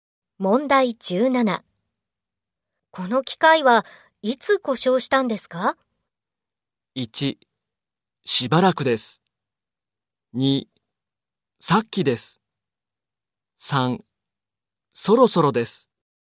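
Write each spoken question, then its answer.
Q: この機械はいつ故障したんですか?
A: 2: さっきです。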